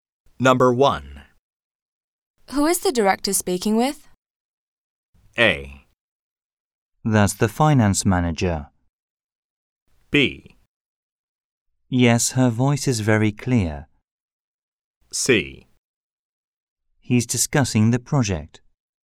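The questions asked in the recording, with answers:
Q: Who is the director speaking with?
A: A: That's the finance manager.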